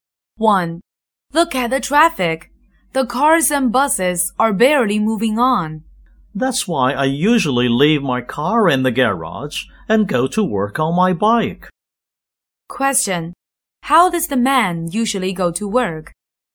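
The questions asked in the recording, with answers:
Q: How does the man usually go to work?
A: By bike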